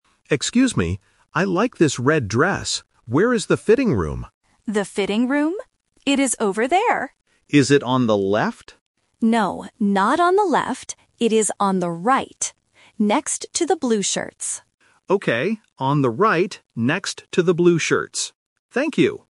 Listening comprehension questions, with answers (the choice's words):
Listen to the conversation between a customer and a shop assistant. Choose the correct answer (A, B, or C) for each question.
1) What clothes does the customer have?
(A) A blue shirt.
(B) A red dress.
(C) A red hat.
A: A red dress.

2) What is the customer looking for?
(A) The fitting room.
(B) The cashier.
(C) The restroom.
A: The fitting room.

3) Where is the fitting room?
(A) On the left.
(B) On the right.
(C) Near the door.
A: On the right.

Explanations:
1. The customer clearly says in the first line, "I like this red dress." Option A (A blue shirt) is the trap because the assistant mentions "blue shirts" later as a location marker. Option C is not mentioned.
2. The customer asks directly, "Where is the fitting room?" and the assistant repeats it. Options B and C are plausible places to look for in a store, but they are not mentioned in the audio.
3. The assistant explicitly says, "It is on the right." Option A (On the left) is the trap because the customer asks "Is it on the left?", but the assistant says "No, not on the left." Option C is not mentioned.

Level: A1